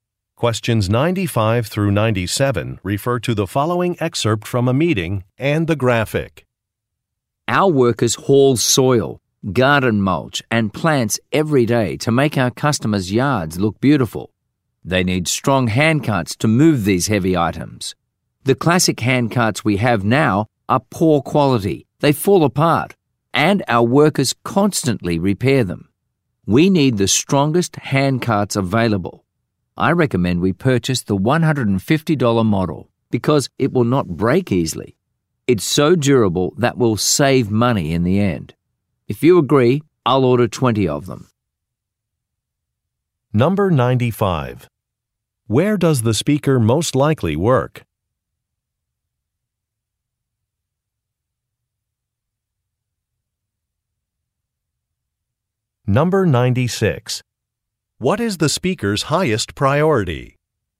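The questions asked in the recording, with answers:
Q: Where does the speaker most likely work?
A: At a landscaping company

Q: What is the speaker's highest priority?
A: Durability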